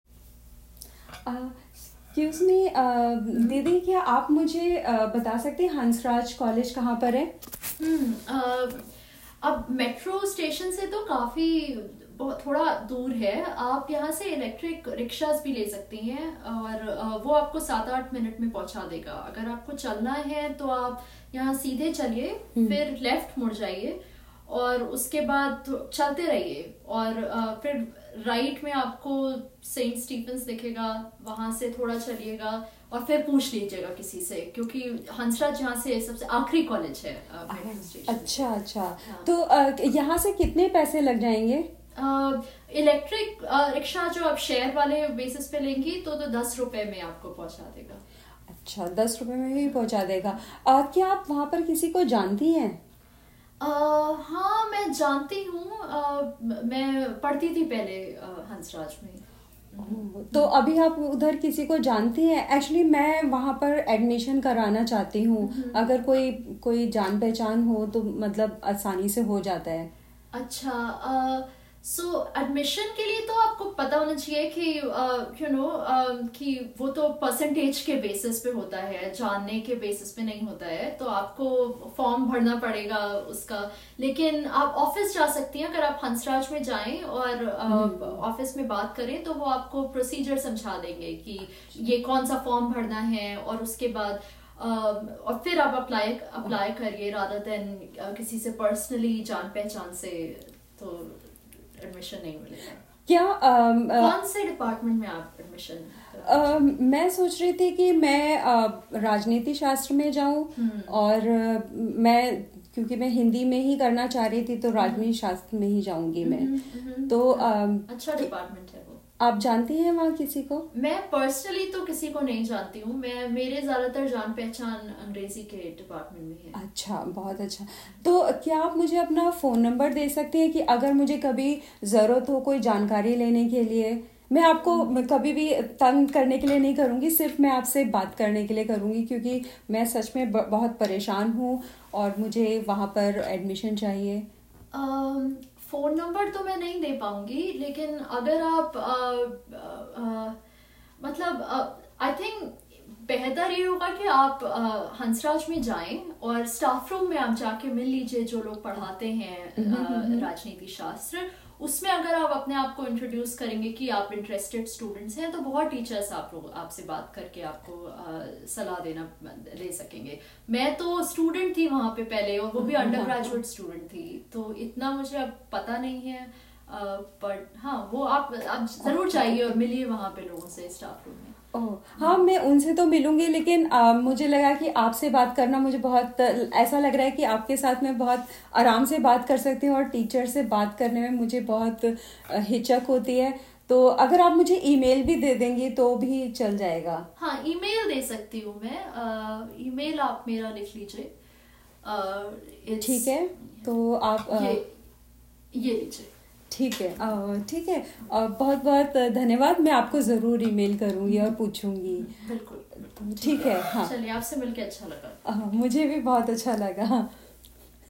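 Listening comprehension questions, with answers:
Listen to the audio and answer these questions in Hindi or English.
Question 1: Where does the tourist lady want to go?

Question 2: What is the best transportation suggested by the local lady?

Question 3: How much do they charge for the e-rickshaw to go to Hansraj College?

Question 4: Why does the tourist lady ask the local lady if she knows someone at Hansraj College?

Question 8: How did they end the conversation? Write the phrase in Hindi.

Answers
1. Hansraj College
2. An electric rickshaw (e-rickshaw)
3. 10 rupees on a shared basis
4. She wants admission there, and knowing someone makes it easier
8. चलिए, आपसे मिलकर अच्छा लगा। / मुझे भी बहुत अच्छा लगा।

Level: Intermediate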